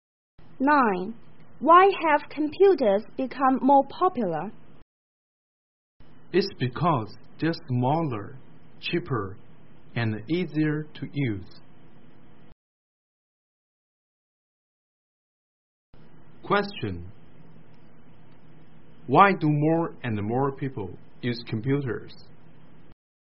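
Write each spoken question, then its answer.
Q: Why do more and more people use computers?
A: They're smaller, cheaper and easier to use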